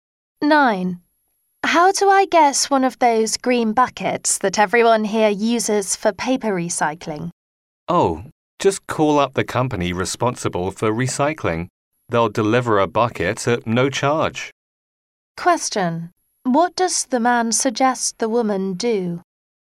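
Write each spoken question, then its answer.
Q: What does the man suggest the woman do?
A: Call the recycling company.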